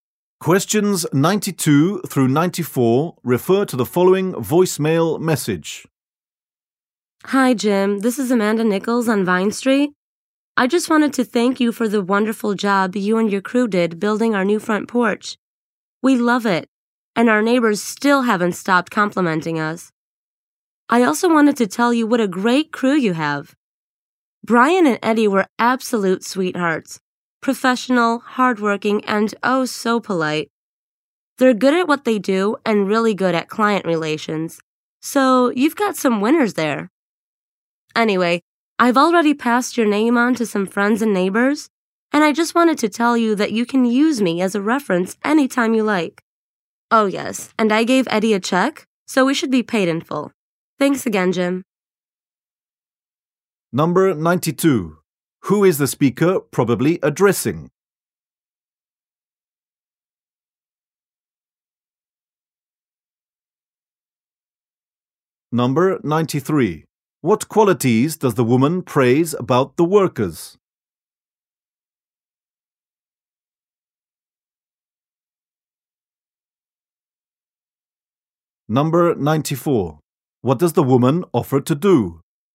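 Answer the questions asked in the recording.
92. A building contractor
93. Professional, hardworking and polite
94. Be a reference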